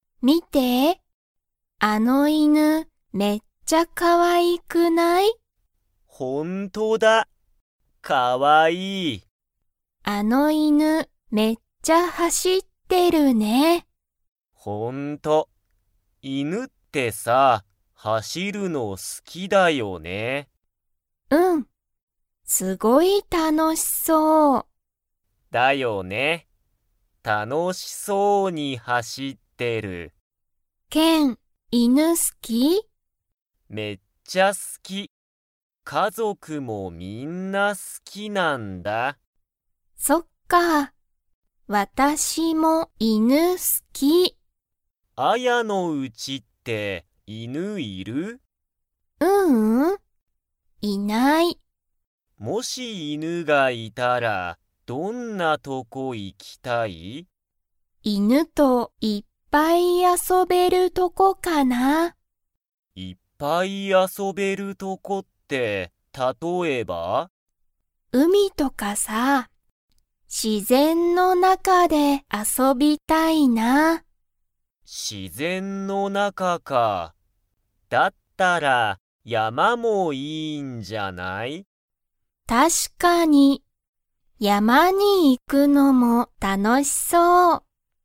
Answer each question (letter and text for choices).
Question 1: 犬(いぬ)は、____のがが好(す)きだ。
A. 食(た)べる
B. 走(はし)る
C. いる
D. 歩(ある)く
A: B. 走(はし)る

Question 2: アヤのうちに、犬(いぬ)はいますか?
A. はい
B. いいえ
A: B. いいえ

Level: Level 2